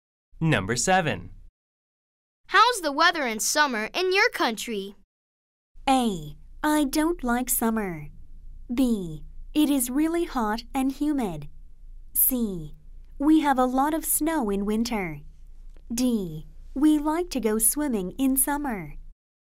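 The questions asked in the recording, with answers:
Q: How's the weather in summer in your country?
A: B: It is really hot and humid.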